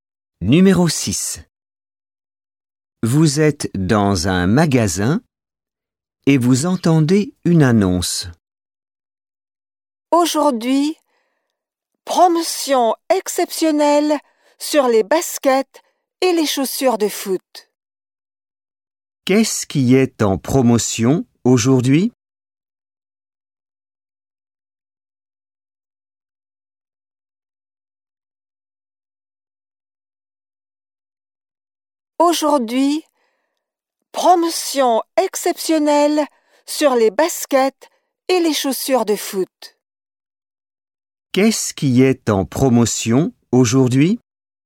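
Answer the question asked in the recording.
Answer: Les baskets et les chaussures de foot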